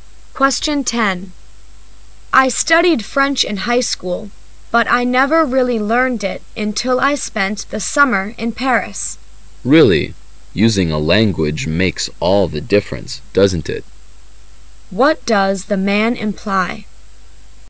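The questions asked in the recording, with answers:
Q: What does the man imply?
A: Actually using a language is the best way to learn it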